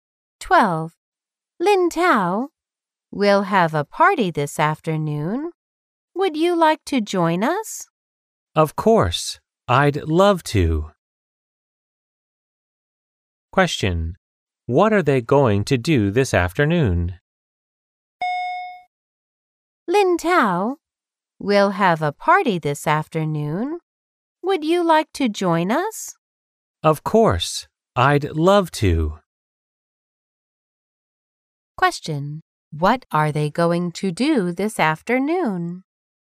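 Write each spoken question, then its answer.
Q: What are they going to do this afternoon?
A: Have a party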